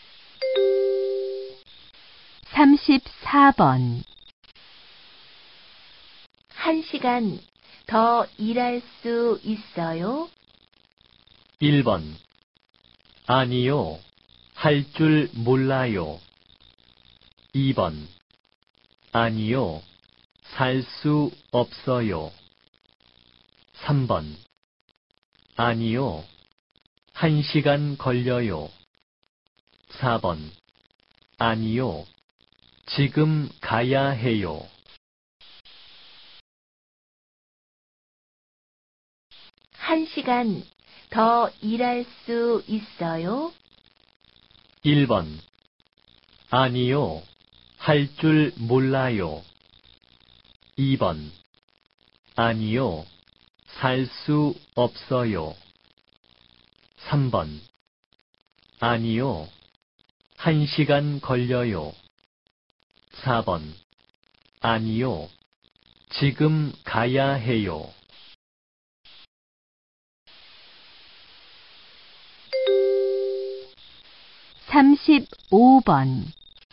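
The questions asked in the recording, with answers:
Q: 한 시간 더 일할 수 있어요?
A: 4: 아니요. 지금 가야 해요.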